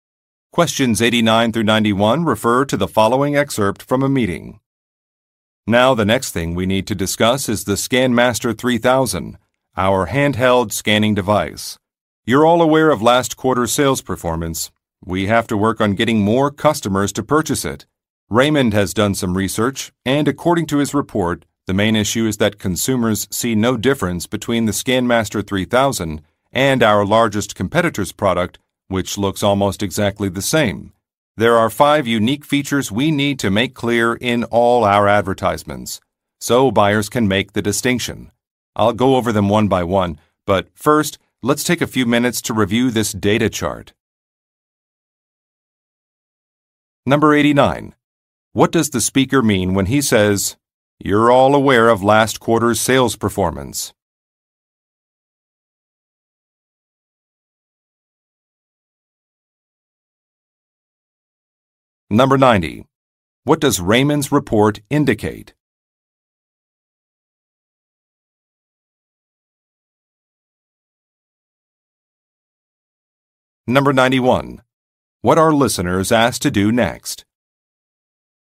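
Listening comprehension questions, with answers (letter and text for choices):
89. What does the speaker mean when he says, "You're all aware of last quarter's sales performance"?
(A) The listeners will not review a report.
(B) Some data should not have been released.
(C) The listeners know that a product has not sold well.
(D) Some sales figures are incorrect.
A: (C) The listeners know that a product has not sold well.

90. What does Raymond's report indicate?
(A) A competitor's product is more affordable.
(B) A competitor's advertising campaign is better.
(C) Consumers cannot tell the difference between some products.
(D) Consumers have complained about the features of an item.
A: (C) Consumers cannot tell the difference between some products.

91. What are listeners asked to do next?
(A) Submit an invoice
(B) Contact some clients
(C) Test some devices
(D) Look over a document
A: (D) Look over a document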